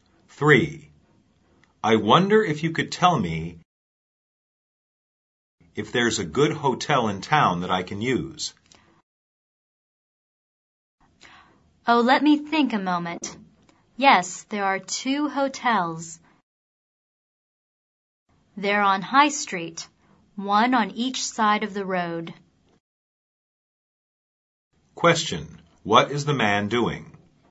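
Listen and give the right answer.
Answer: Asking for information about a hotel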